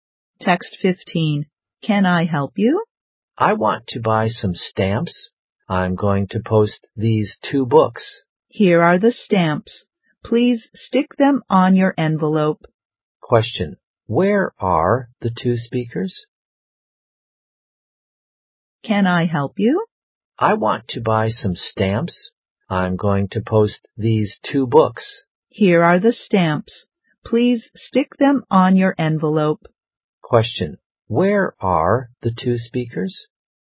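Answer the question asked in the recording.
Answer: At a post office.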